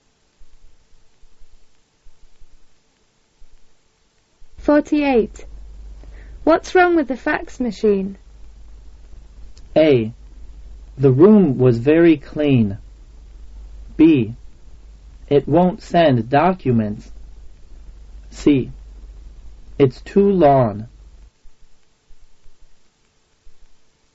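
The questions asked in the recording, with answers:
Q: What's wrong with the fax machine?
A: B: It won't send documents.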